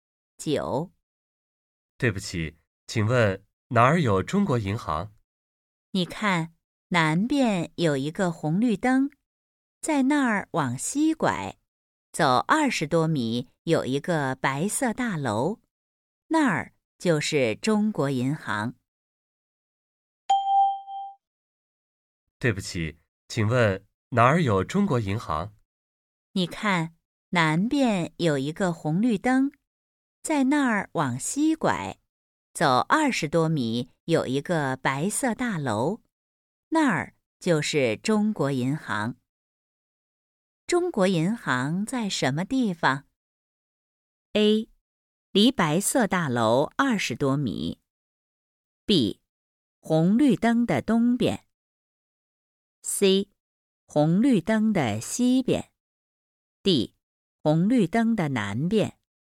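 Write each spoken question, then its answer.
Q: 中国银行在什么地方?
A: C: 红绿灯的西边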